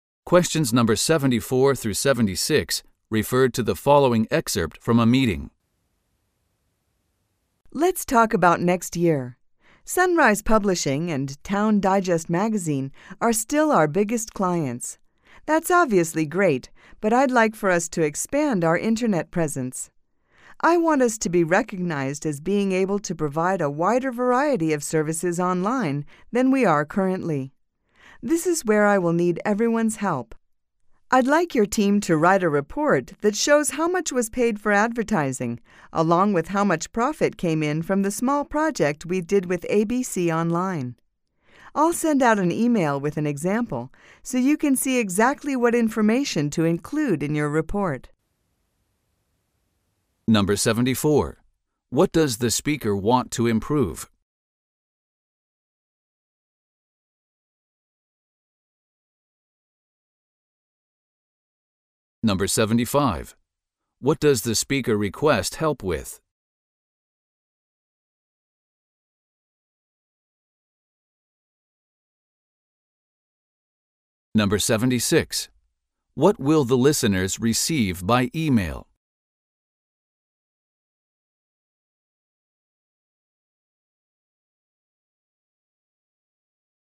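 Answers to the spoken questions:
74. Their internet presence (the variety of online services)
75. Writing a report on advertising costs and profit from the ABC Online project
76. An example report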